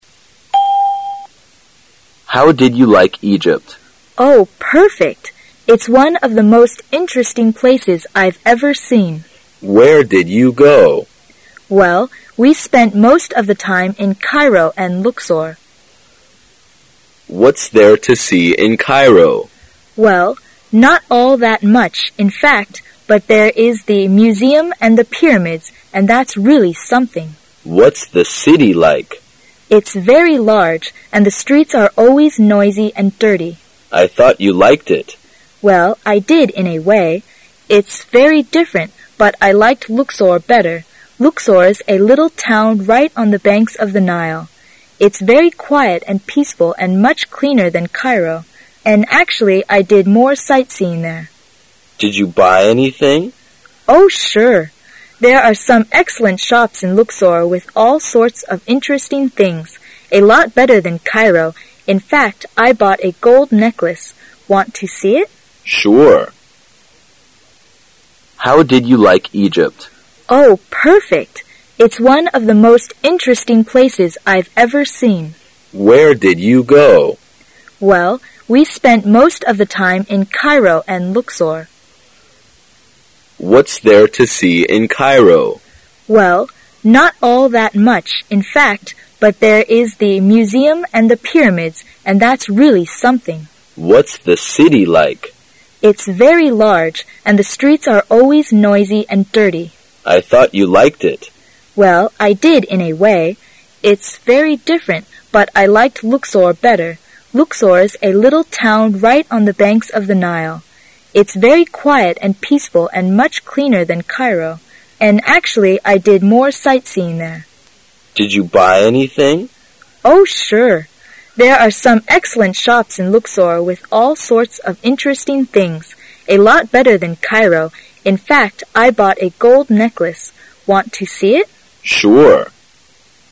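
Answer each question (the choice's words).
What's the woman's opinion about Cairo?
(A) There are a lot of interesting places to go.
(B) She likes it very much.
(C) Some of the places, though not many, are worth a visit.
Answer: Some of the places, though not many, are worth a visit.

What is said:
[听力原文] 10-12 M: How did you like Egypt? W: Oh, perfect. It's one of the most interesting places I've ever seen. M: Where did you go? W: Well, we spent most of the time in Cairo and Luxor. M: What's there to see in Cairo? W: Well, not all that much, in fact, but there is the museum and the pyramids, and that's really something. M: What's the city like? W: It's very large, and the streets are always noisy and dirty. M: I thought you liked it. W: Well, I did in a way. It's very different, but I liked Luxor better. Luxor's a little town right on the banks of the Nile. It's very quiet and peaceful and much cleaner than Cairo. 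And actually I did more sightseeing there. M: Did you buy anything? W: Oh, sure. There are some excellent shops in Luxor with all sorts of interesting things. A lot better than Cairo, in fact, I bought a gold necklace. Want to see it? M: Sure.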